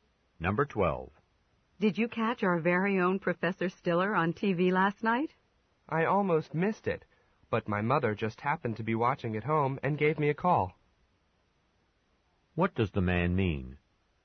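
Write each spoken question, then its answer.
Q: What does the man mean?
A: He saw the program because his mother called him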